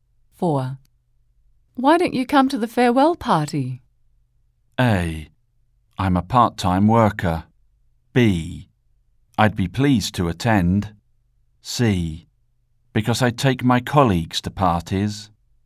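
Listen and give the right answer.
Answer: B: I'd be pleased to attend.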